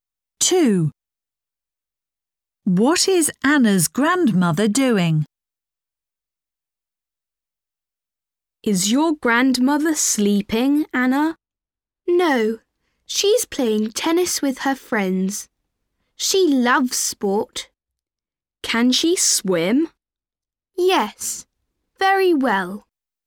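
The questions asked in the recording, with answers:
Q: What is Anna's grandmother doing?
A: Playing tennis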